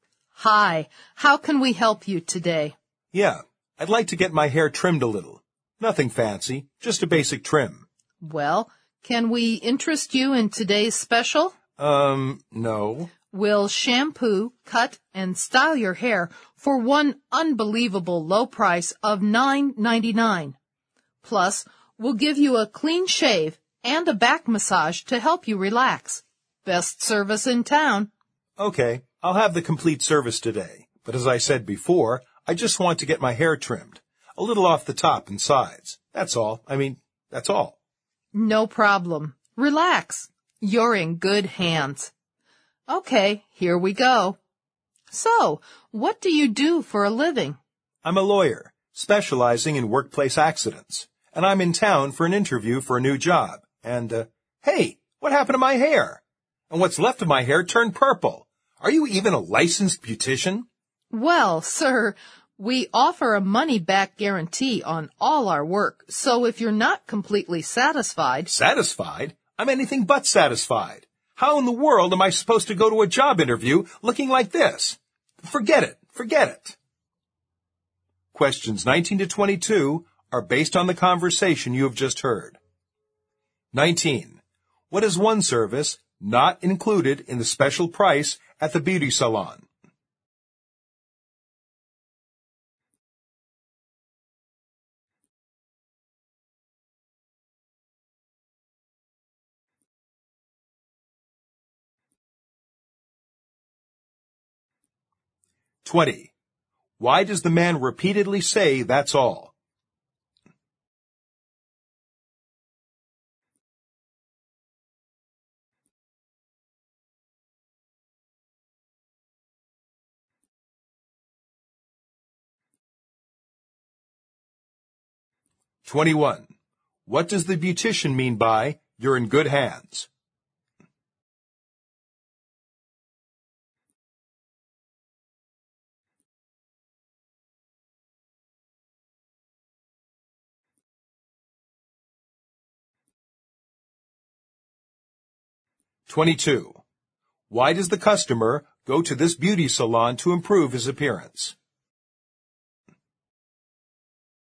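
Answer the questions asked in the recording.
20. He only wants a basic trim, a little off the top and sides.
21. He will take good care of the man, so the man can relax.
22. He is in town for a job interview.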